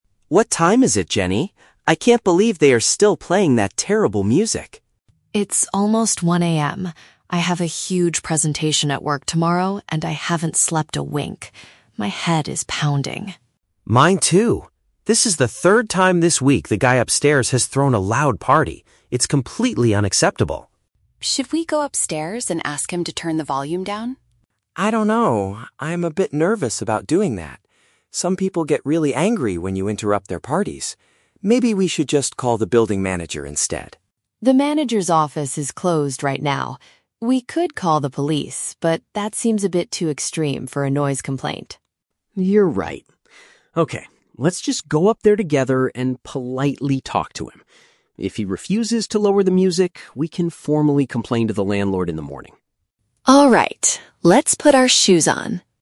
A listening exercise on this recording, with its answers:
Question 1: Why is Jenny particularly upset about the lack of sleep?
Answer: She has an important professional task the next day.

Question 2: Where is the loud noise coming from?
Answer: The apartment located directly above them.

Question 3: What do the roommates finally decide to do?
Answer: Visit the neighbor in person to request a quieter environment.

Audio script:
Tom: What time is it, Jenny? I can't believe they are still playing that terrible music.
Jenny: It's almost 1:00 AM. I have a huge presentation at work tomorrow, and I haven't slept a wink. My head is pounding.
Tom: Mine too. This is the third time this week the guy upstairs has thrown a loud party. It's completely unacceptable.
Jenny: Should we go upstairs and ask him to turn the volume down?
Tom: I don't know... I'm a bit nervous about doing that. Some people get really angry when you interrupt their parties. Maybe we should just call the building manager instead?
Jenny: The manager's office is closed right now. We could call the police, but that seems a bit too extreme for a noise complaint.
Tom: You're right. Okay, let's just go up there together and politely talk to him. If he refuses to lower the music, we can formally complain to the landlord in the morning.